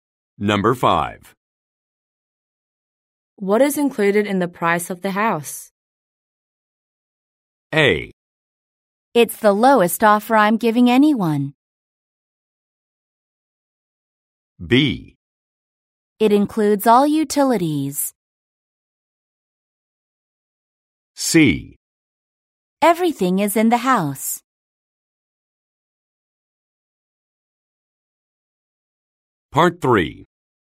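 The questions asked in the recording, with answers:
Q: What is included in the price of the house?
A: B: It includes all utilities.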